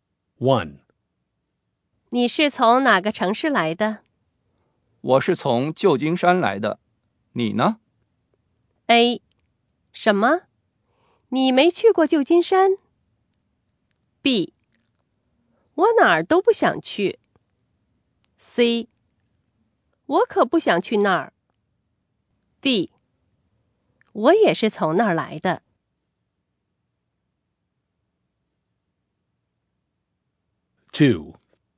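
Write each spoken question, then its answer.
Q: 我是从旧金山来的。你呢?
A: D: 我也是从那儿来的。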